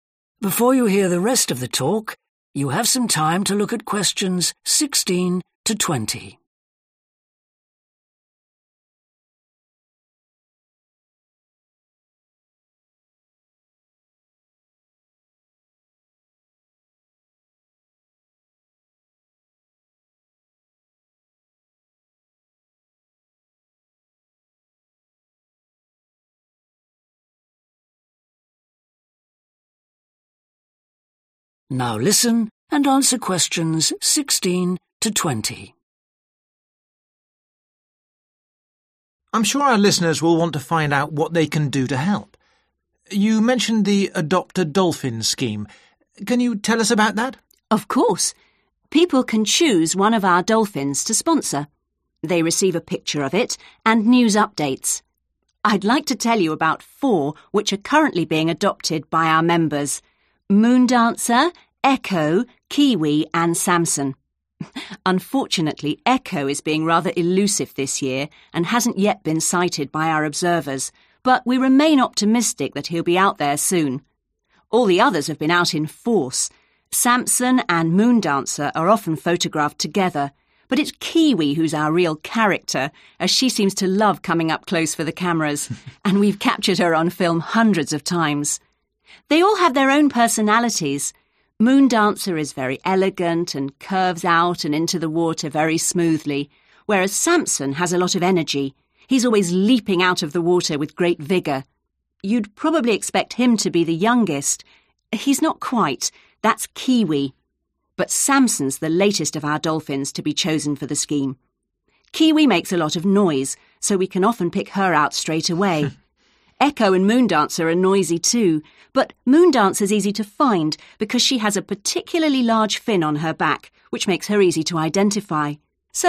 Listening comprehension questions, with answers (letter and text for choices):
Which dolphin does Alice make each of the following comments about? Choose the correct letter, A, B, C or D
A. Moondancer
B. Echo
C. Kiwi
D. Samson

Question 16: It has not been seen this year.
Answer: B. Echo

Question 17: It is photographed more than the others.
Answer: C. Kiwi

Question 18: It is always very energetic.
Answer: D. Samson

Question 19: It is the newest one in the scheme.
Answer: D. Samson

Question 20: It has an unusual shape.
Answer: A. Moondancer

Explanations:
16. Echo is being rather elusive this year and hasn't yet been sighted (=has not been seen) by our observers (Echo năm nay khá khó nắm bắt và chưa được các nhà quan sát của chúng tôi nhìn thấy)
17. Kiwi who's our real 'character' as she seems to love coming up close for the cameras and we've captured her on film hundreds of times (= photographed more than others) (Kiwi là 'nhân vật' thực sự của chúng tôi vì cô ấy có vẻ thích đến gần máy ảnh và chúng tôi đã chụp cô ấy trên phim hàng trăm lần)
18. Samson has a lot of energy (=very energetic) – he's always leaping out of the water with great vigor (Samson có rất nhiều năng lượng – cá heo luôn nhảy lên khỏi mặt nước một cách mạnh mẽ)
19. Samson's the latest (=the newest) of our dolphins to be chosen for the scheme (Samson là con cá heo mới nhất của chúng tôi được chọn cho chương trình)
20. Moondancer is easy to find because she has a particularly (=unusual) large fin on her back, which makes her easy to identify (Moondancer rất dễ tìm thấy vì nó có một chiếc vây đặc biệt lớn trên lưng, giúp nó dễ dàng được nhận ra)

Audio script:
INTERVIEWER: I'm sure our listeners will want to find out what they can do to help. You mentioned the 'Adopt a Dolphin' scheme. Can you tell us about that?
ALICE: Of course! People can choose one of our dolphins to sponsor. They receive a picture of it and news updates. I'd like to tell you about four which are currently being adopted by our members: Moondancer, Echo, Kiwi and Samson. Unfortunately,
is being rather elusive this year and
hasn't yet been sighted (=has not been seen)
by our observers
but we remain optimistic that he'll be out there soon. All the others have been out in force – Samson and Moondancer are often photographed together but it is
who's our real 'character' as she seems to love coming up close for the cameras and we've
captured her on film hundreds of times (= photographed more than others)
They all have their own personalities – Moondancer is very elegant and curves out and into the water very smoothly, whereas
has a lot of energy (=very energetic)
– he's always leaping out of the water with great vigor
You'd probably expect him to be the youngest – he's not quite – that's Kiwi – but
Samson's
the latest (=the newest)
of our dolphins
to be chosen for the scheme
Kiwi makes a lot of noise so we can often pick her out straightaway. Echo and Moondancer are noisy too, but
Moondancer is easy
to find because she
has a particularly (=unusual) large fin
on her back, which makes her easy to identify